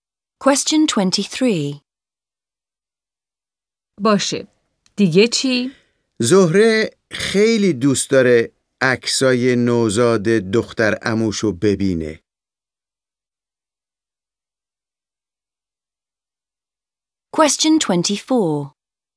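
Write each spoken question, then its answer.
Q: باشه. دیگه چی؟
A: عکس‌های نوزاد دختر عموی زهره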